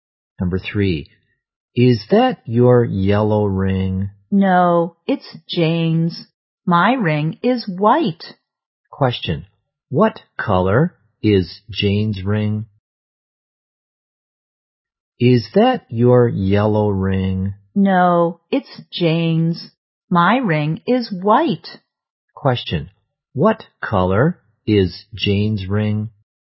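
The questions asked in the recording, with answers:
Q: Question, what color is Jane's ring?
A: Yellow.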